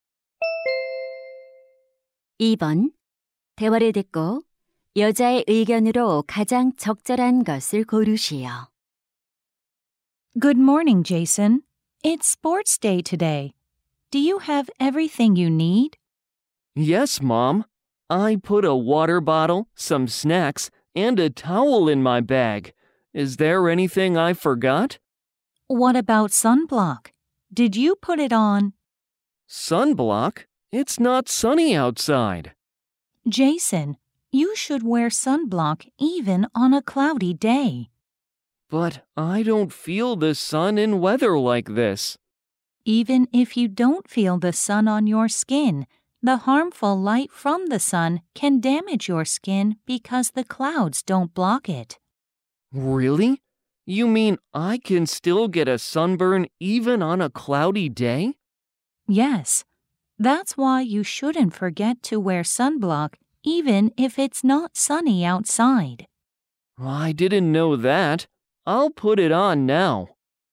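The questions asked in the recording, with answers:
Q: 대화를 듣고 여자의 의견으로 가장 적절한 것을 고르시오.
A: 흐린 날에도 자외선 차단제를 발라야 한다.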